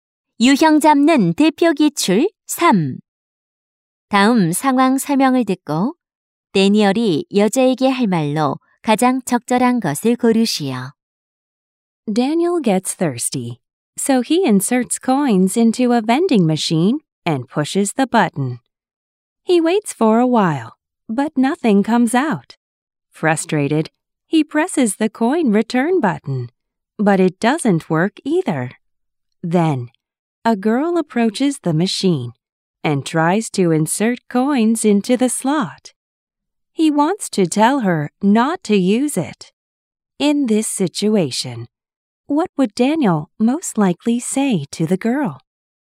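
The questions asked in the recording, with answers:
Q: In this situation, what would Daniel most likely say to the girl?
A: Don't use that machine. It's not working.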